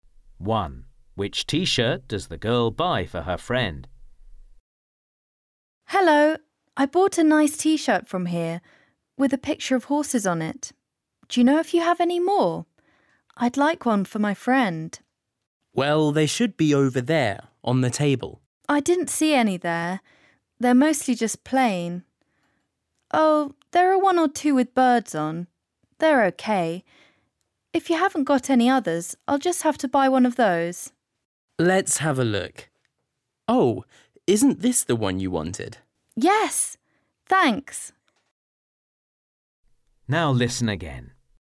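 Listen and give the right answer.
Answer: The one with horses on it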